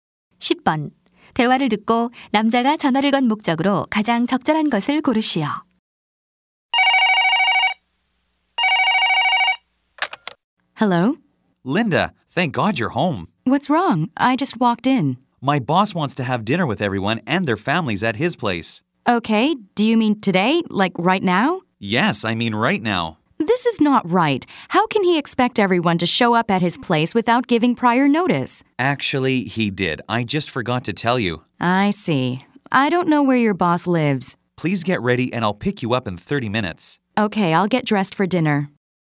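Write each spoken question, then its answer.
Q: 대화를 듣고 남자가 전화를 건 목적으로 가장 적절한 것을 고르시오.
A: 상사 집 저녁 식사에 가도록 준비를 부탁하려고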